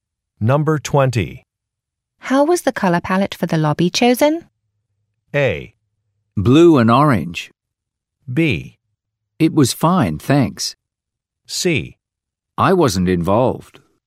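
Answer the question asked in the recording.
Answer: C: I wasn't involved.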